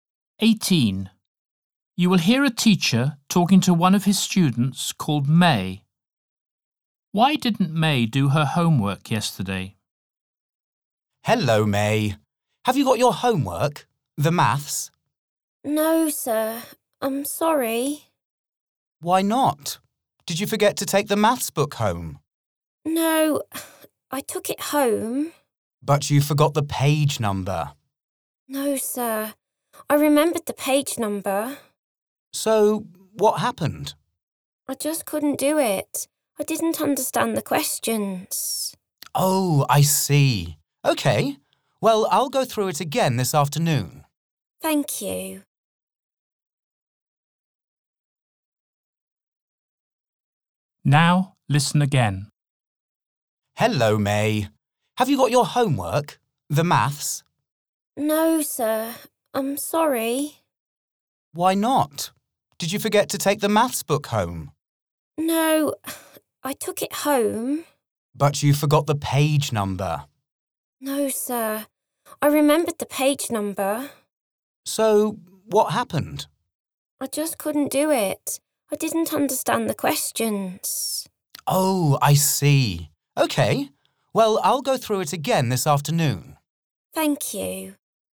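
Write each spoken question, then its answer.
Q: Why didn't May do her homework yesterday?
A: she didn't understand the questions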